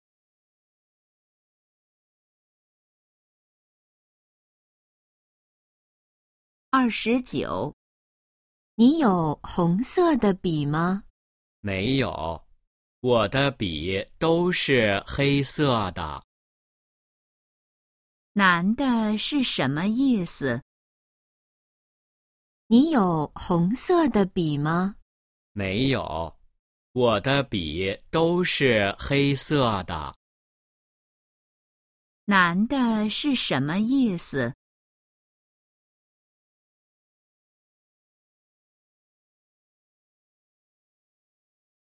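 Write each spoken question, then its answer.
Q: 男的是什么意思?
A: 他没有红色的笔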